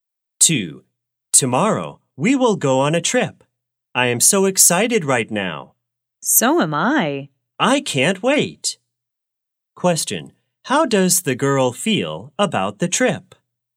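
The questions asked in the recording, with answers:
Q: Question, how does the girl feel about the trip?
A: Excited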